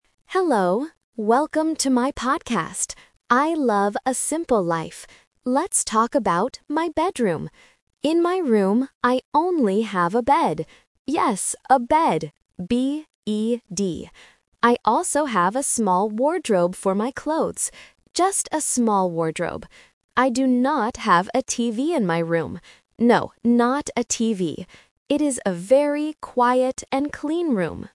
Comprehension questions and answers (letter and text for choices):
Listen to the podcast and choose the correct answer (A, B, or C).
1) What object does the speaker spell out loud?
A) T-V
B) B-E-D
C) C-L-E-A-N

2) What does the speaker have for their clothes?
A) A big wardrobe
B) A small wardrobe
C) A big box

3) What item is NOT in the bedroom?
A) A TV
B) A bed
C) A wardrobe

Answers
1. B) B-E-D
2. B) A small wardrobe
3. A) A TV

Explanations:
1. The podcaster clearly says "Yes, a bed" and spells it "B-E-D". Option (A) is the trap because "TV" is mentioned in the audio, but it is not spelled out. Option (C) "clean" is also mentioned at the end but not spelled.
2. The speaker says, "I also have a small wardrobe for my clothes." Option (A) is the trap because it uses the correct furniture (wardrobe) but the wrong size (big instead of small). Option (C) is a plausible item for storage but is never mentioned.
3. The podcaster explicitly states, "I do not have a TV in my room." Options (B) and (C) are the traps because they are items that are actually in the room, whereas the question asks what is not there.

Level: A1